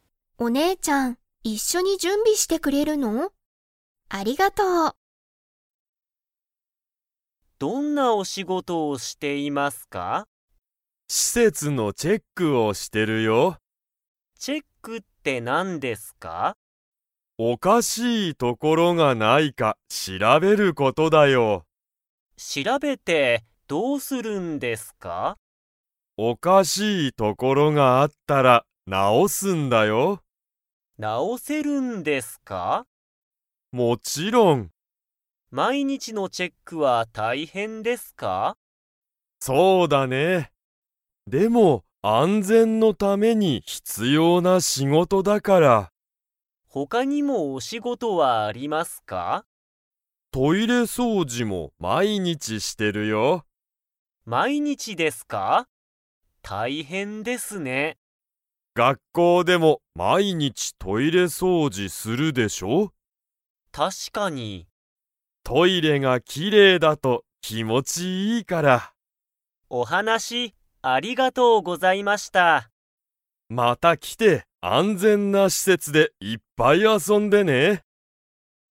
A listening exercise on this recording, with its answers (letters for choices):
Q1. スタッフは、施設しせつにおかしい所ところがないか 。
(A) 遊あそぶ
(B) 掃除そうじする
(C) 直なおす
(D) 調しらべる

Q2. スタッフは、トイレ掃除そうじをしますか?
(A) はい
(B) いいえ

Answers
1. D
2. A

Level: Level 4